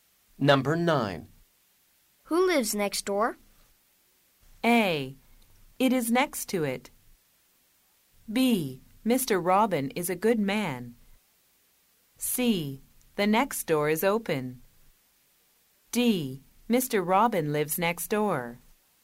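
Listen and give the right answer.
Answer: D: Mr. Robin lives next door.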